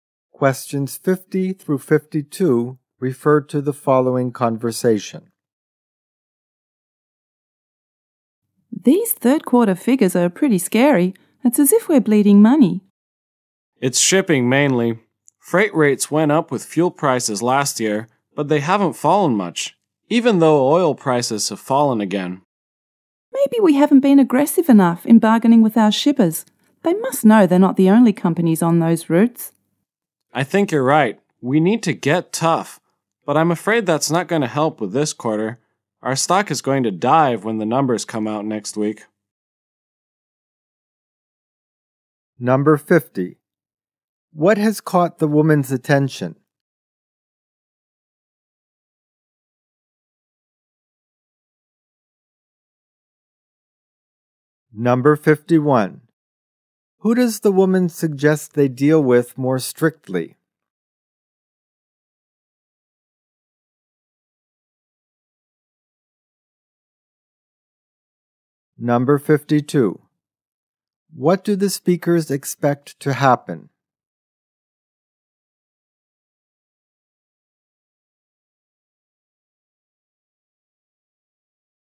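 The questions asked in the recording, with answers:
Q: Who does the woman suggest they deal with more strictly?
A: Their shippers

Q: What do the speakers expect to happen?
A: Their stock price will fall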